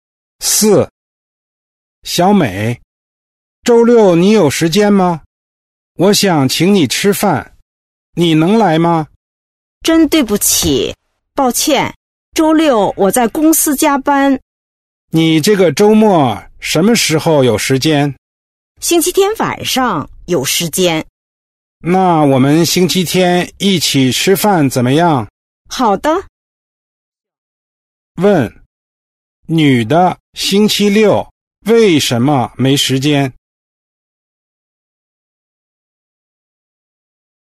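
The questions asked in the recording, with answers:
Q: 女的星期六为什么没时间?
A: 她在公司加班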